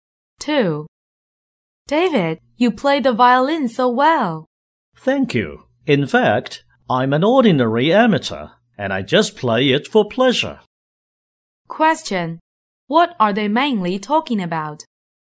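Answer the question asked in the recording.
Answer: David's violin playing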